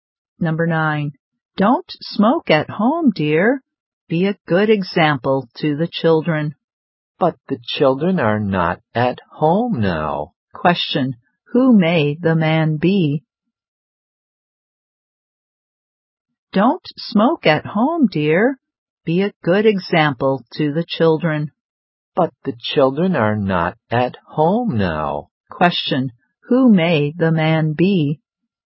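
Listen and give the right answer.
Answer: The woman's husband (the children's father)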